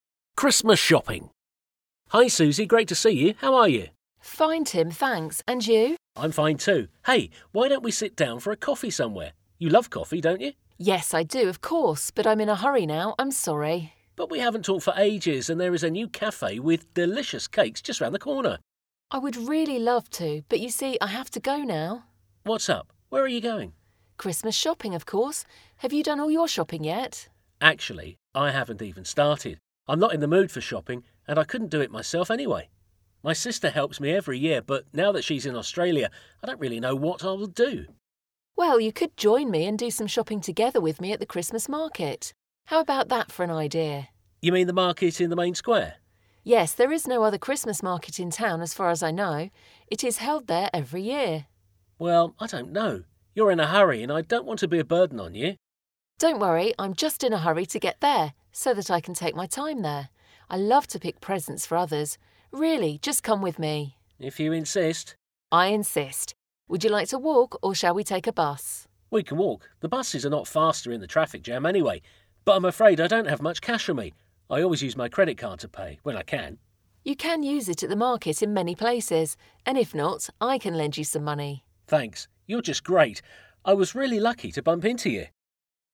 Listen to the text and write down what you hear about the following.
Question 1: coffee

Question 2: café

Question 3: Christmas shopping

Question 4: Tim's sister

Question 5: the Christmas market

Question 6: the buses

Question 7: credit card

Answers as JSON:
{"1": "Suzy loves it.", "2": "There is a new café with delicious cakes just round the corner.", "3": "Suzy is going Christmas shopping now, Tim hasn't started it yet (and couldn't do it himself).", "4": "She helps him with the Christmas shopping every year. She's in Australia now.", "5": "It's held at the main square every year. (There is no other Christmas market in the town.) Tim will go there with Suzy.", "6": "They are slow / not faster in the traffic jam than walking.", "7": "Tim always uses his to pay (when he can). It can be used in many places at the market."}

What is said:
Tim: Hi Suzy, great to see you. How are you?
Suzy: Fine Tim, thanks. And you?
Tim: I'm fine, too. Hey, why don't we sit down for a coffee somewhere? You love coffee, don't you?
Suzy: Yes, I do, of course. But I'm in a hurry now, I'm sorry.
Tim: But we haven't talked for ages and there is a new café with delicious cakes just round the corner.
Suzy: I would really love to but you see, I have to go now.
Tim: What's up? Where're are you going?
Suzy: Christmas shopping, of course. Have you done all your shopping yet?
Tim: Actually, I haven't even started. I'm not in the mood for shopping. And I couldn't do it myself, anyway. My sister helps me every year but now that she's in Australia I don't really know what I will do.
Suzy: Well, you could join me and do some shopping together with me at the Christmas market. How about that for an idea?
Tim: You mean the market at the main square?
Suzy: Yes, there is no other Christmas market in town as far as I know. It is held there every year.
Tim: Well, I don't know. You're in a hurry and I don't want to be a burden on you.
Suzy: Don't worry, I'm just in a hurry to get there so that I can take my time there. I love to pick presents for others. Really. Just come with me.
Tim:If you insist...
Suzy:I insist. Would you like to walk or shall we take a bus?
Tim:We can walk, the buses are not faster in the traffic jam, anyway. But I'm afraid I don't have much cash on me. I always use my credit card to pay, when I can.
Suzy:You can use it at the market in many places. And if not, I can lend you some money.
Tim:Thanks, you're just great. I was really lucky to bump into you.

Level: B1 szint